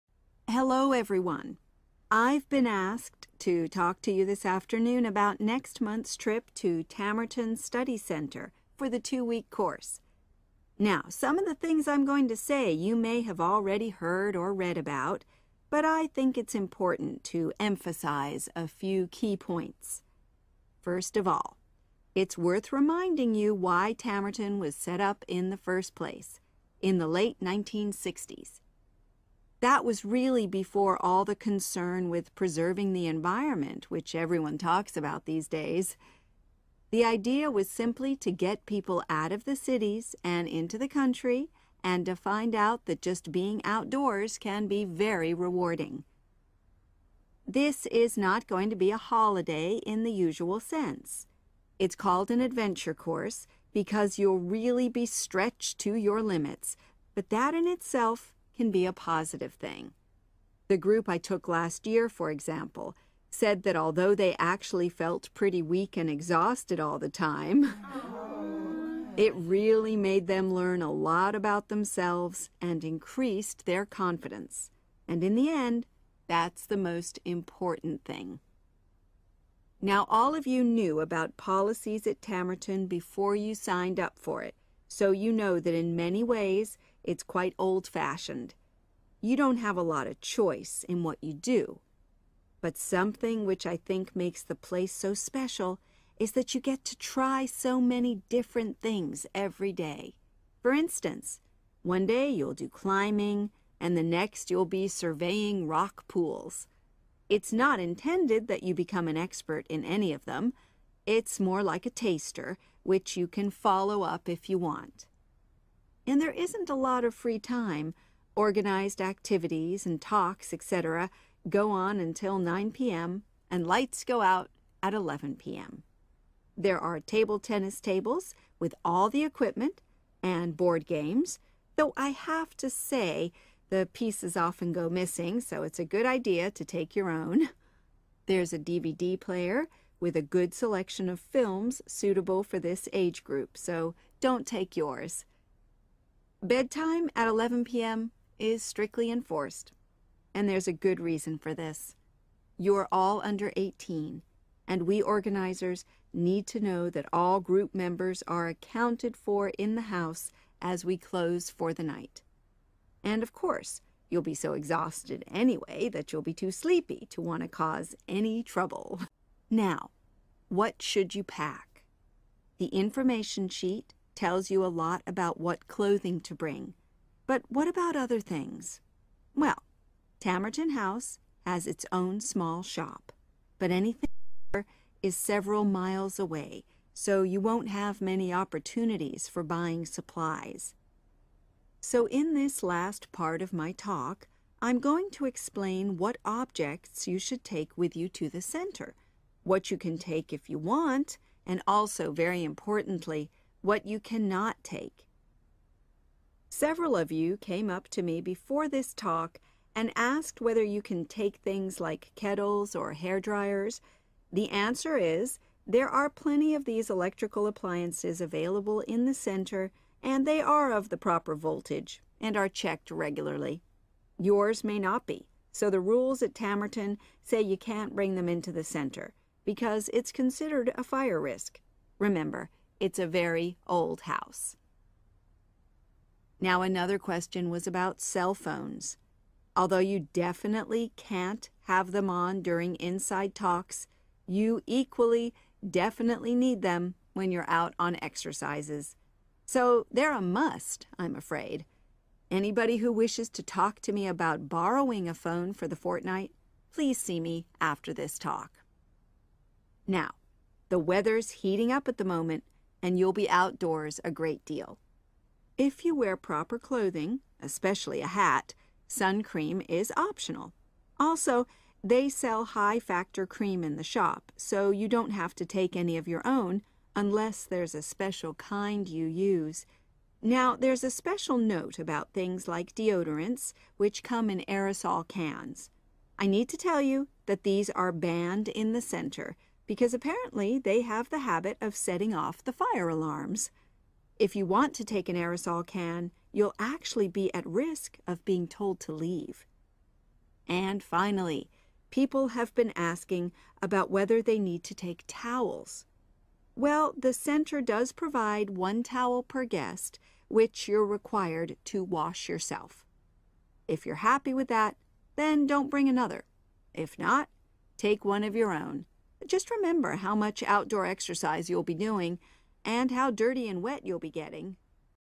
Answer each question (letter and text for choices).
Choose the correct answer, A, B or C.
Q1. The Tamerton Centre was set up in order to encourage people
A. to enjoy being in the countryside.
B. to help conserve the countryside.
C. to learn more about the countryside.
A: A. to enjoy being in the countryside.

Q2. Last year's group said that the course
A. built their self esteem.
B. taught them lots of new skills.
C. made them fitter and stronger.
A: A. built their self esteem.

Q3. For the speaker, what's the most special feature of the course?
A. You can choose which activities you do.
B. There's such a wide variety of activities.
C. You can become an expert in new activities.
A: B. There's such a wide variety of activities.

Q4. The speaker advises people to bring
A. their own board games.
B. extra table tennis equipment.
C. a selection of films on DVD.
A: A. their own board games.

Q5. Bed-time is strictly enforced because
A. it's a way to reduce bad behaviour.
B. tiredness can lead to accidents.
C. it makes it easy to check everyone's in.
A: C. it makes it easy to check everyone's in.

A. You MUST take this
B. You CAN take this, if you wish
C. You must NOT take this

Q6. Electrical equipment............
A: C. You must NOT take this

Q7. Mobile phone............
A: A. You MUST take this

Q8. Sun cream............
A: B. You CAN take this, if you wish

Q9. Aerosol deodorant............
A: C. You must NOT take this

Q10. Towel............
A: B. You CAN take this, if you wish